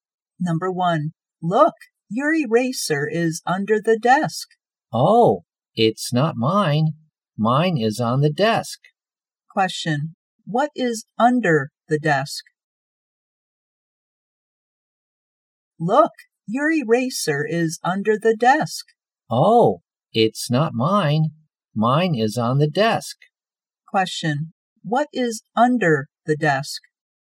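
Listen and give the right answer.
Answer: an eraser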